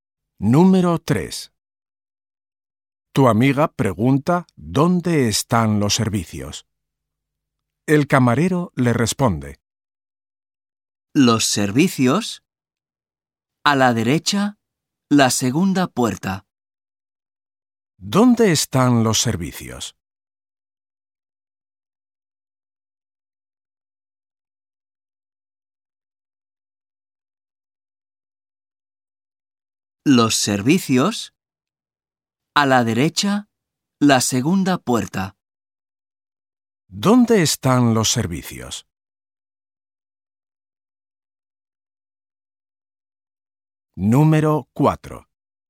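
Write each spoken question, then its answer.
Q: ¿Dónde están los servicios?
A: A la derecha, la segunda puerta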